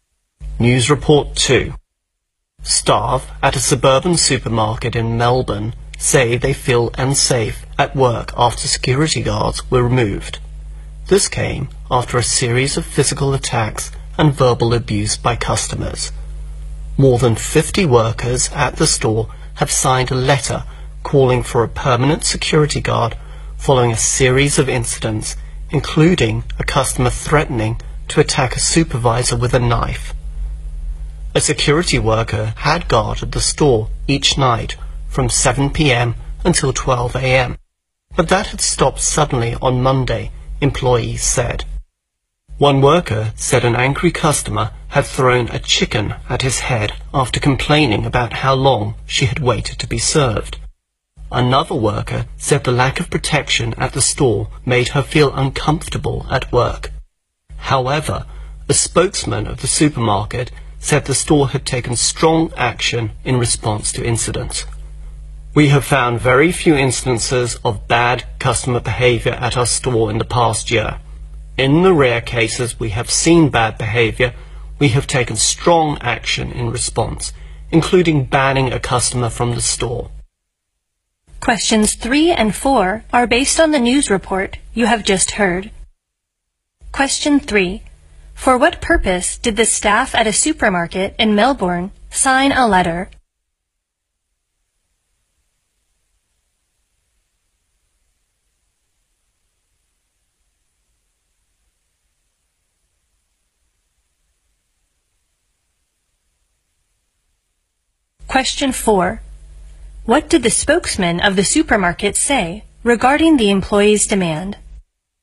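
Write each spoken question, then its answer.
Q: For what purpose did the staff at a supermarket in Melbourne sign a letter?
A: To call for a permanent security guard

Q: What did the spokesman of the supermarket say regarding the employee's demand?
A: The store had taken strong action in response to incidents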